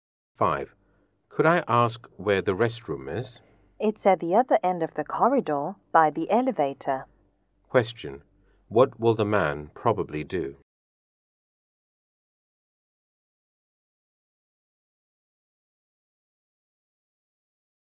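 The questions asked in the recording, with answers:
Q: What will the man probably do?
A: Go to the restroom at the other end of the corridor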